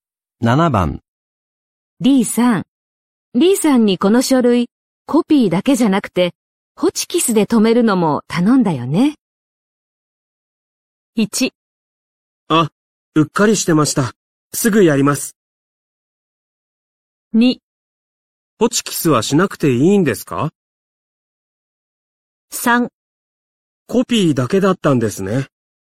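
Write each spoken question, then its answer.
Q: リーさん。リーさんにこの書類、コピーだけじゃなくて、ホチキスで留めるのも頼んだよね。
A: 1: あ、うっかりしてました。すぐやります。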